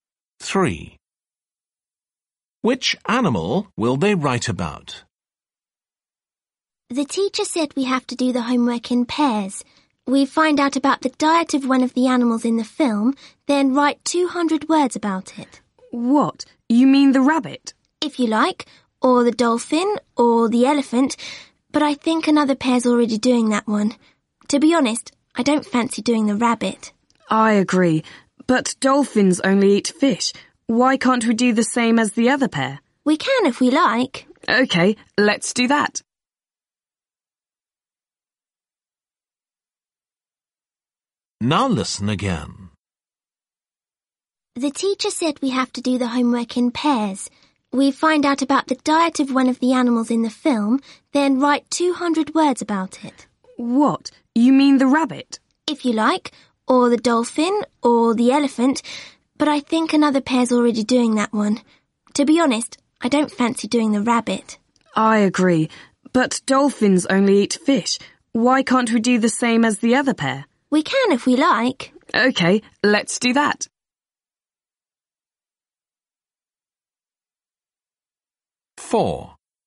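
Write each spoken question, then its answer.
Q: Which animal will they write about?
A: The elephant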